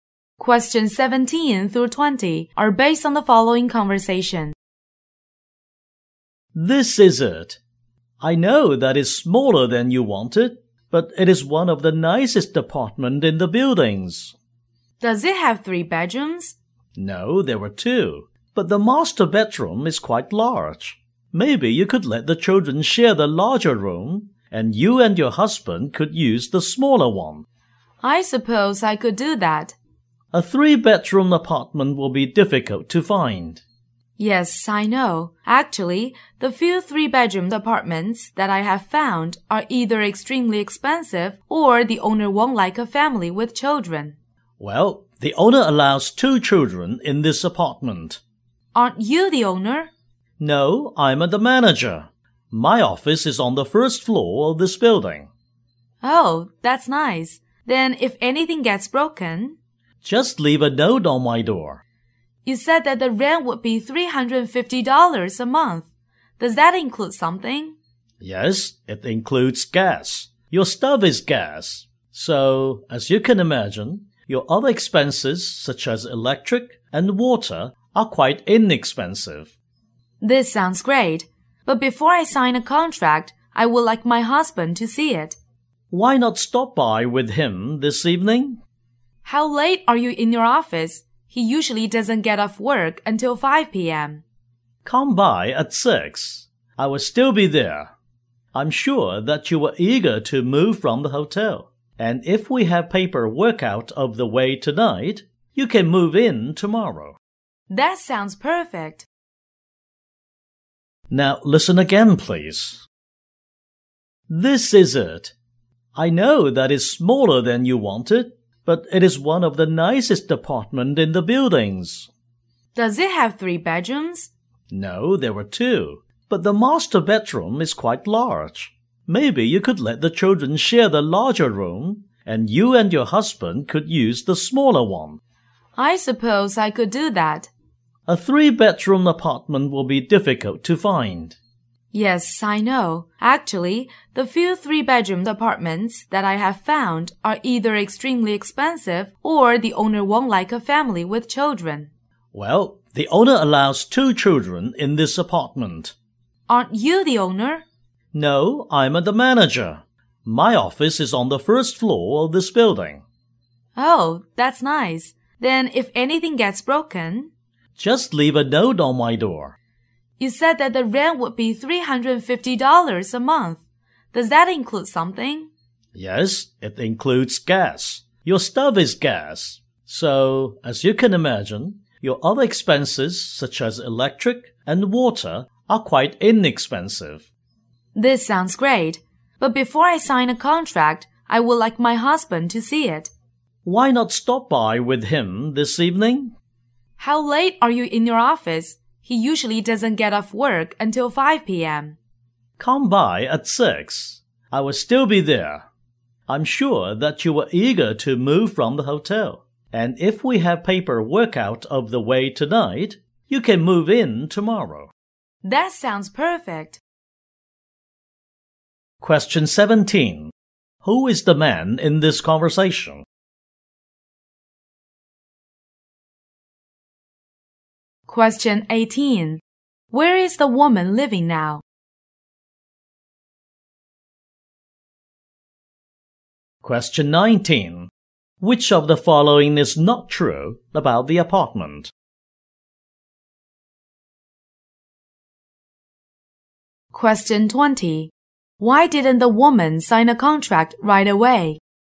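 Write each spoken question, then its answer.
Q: Who is the man in this conversation?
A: The apartment manager

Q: Where is the woman living now?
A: In a hotel

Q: Why didn't the woman sign a contract right away?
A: She wanted her husband to see the apartment first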